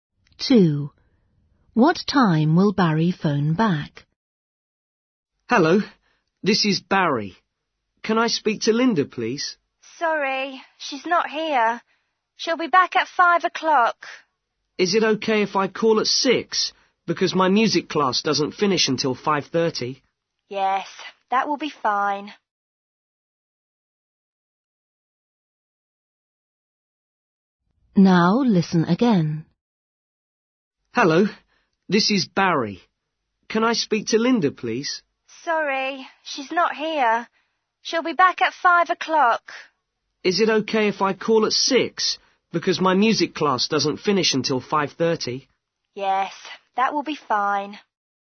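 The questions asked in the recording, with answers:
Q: What time will Barry phone back?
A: 6 o'clock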